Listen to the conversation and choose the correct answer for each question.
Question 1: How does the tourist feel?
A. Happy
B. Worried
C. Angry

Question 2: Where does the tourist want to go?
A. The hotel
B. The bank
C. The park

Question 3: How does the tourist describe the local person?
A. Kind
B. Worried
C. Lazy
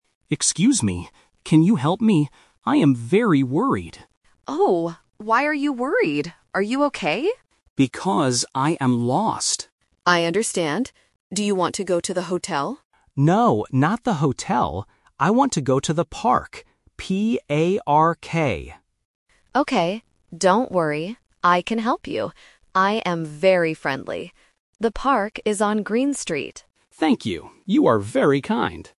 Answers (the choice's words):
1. Worried
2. The park
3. Kind

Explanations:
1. The correct answer is (B). The tourist says two times, "I am very worried" and the local asks "Why are you worried?". Options (A) "Happy" and (C) "Angry" are not mentioned in the audio.
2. The correct answer is (C). The tourist says, "I want to go to the park" and spells it "P-A-R-K." Option (A) "The hotel" is a trap; the local asks if he wants to go to the hotel, but he says "No, not the hotel." Option (B) "The bank" is never mentioned.
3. The correct answer is (A). At the end of the conversation, the tourist says, "You are very kind." (The local also says she is "friendly"). Option (B) "Worried" is a trap; it describes the tourist, not the local person. Option (C) "Lazy" is not mentioned.

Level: A1